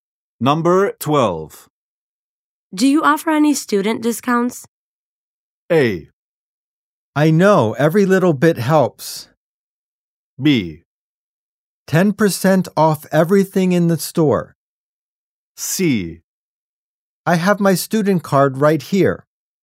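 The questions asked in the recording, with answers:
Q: Do you offer any student discounts?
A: B: 10% off everything in the store.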